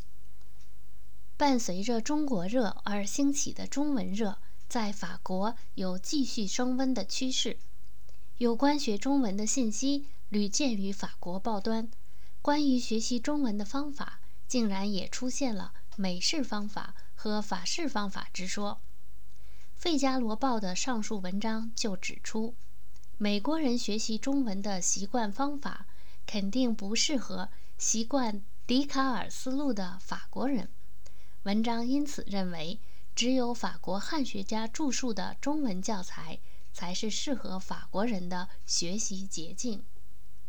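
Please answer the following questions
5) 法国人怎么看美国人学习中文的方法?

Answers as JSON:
{"5": "美国人的习惯方法肯定不适合习惯笛卡尔思路的法国人"}

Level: 3rd Year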